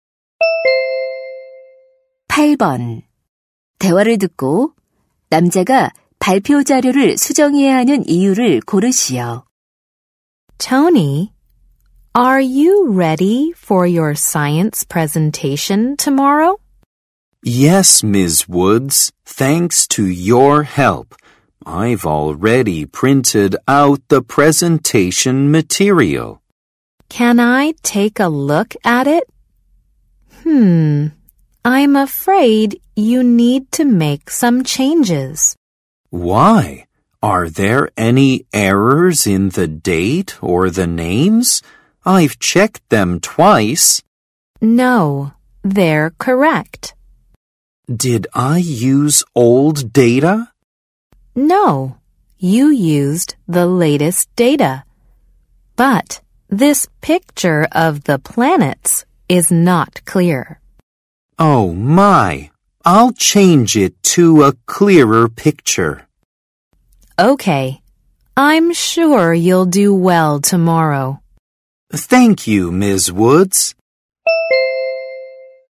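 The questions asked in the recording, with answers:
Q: 대화를 듣고 남자가 발표 자료를 수정해야 하는 이유를 고르시오.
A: 행성 사진이 선명하지 않아서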